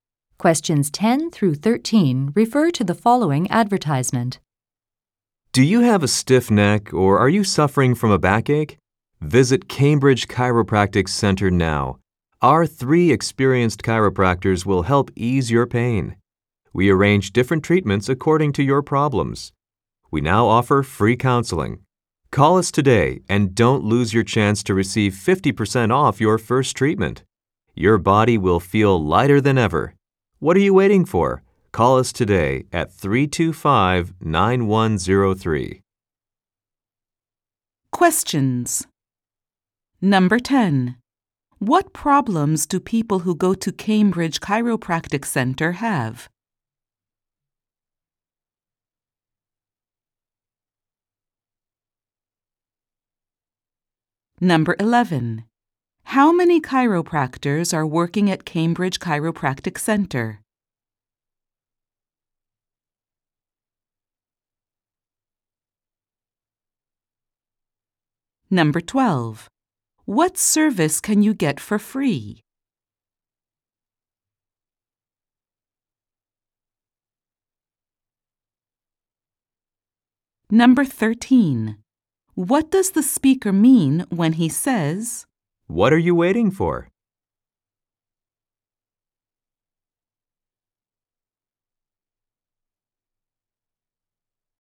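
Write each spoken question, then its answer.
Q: What problems do people who go to Cambridge Chiropractic Center have?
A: A stiff neck or a backache

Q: How many chiropractors are working at Cambridge Chiropractic Center?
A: Three

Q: What service can you get for free?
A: Counseling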